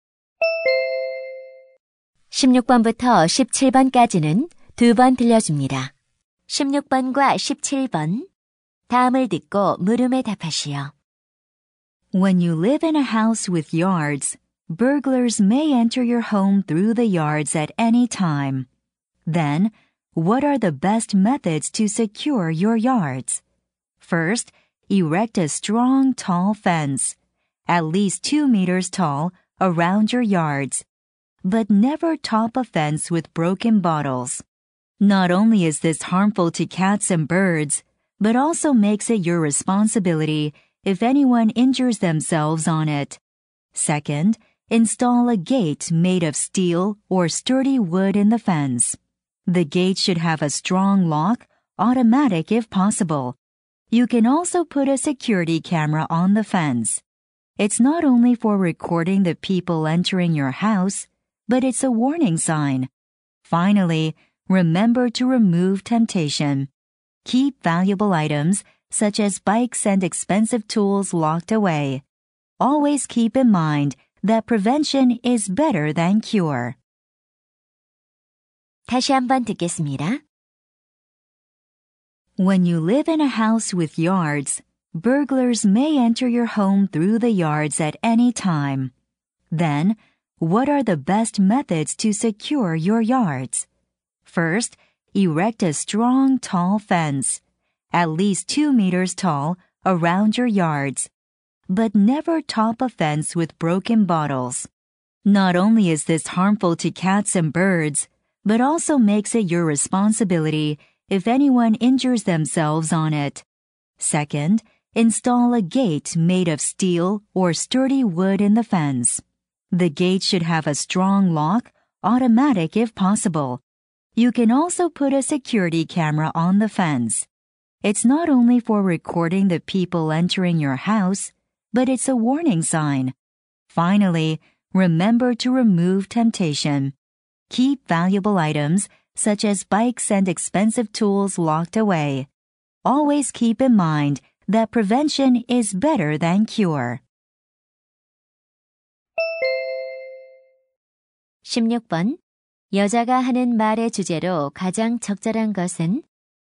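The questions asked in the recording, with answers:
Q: 여자가 하는 말의 주제로 가장 적절한 것은?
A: 도둑으로부터 마당을 안전하게 지키는 방법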